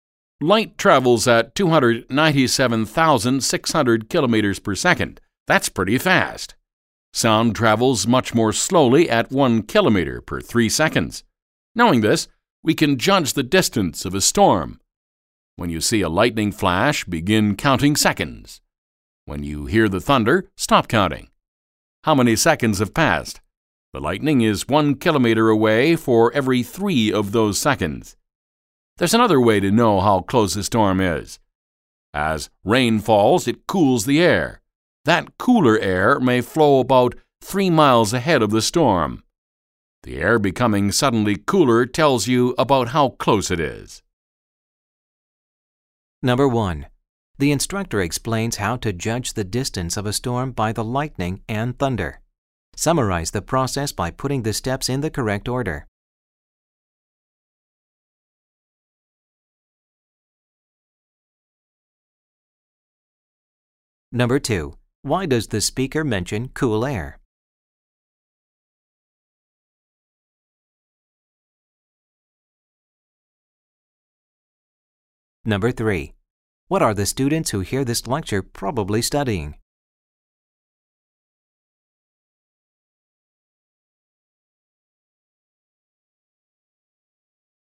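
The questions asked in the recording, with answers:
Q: Why does the speaker mention cool air?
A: It is another way to tell how close a storm is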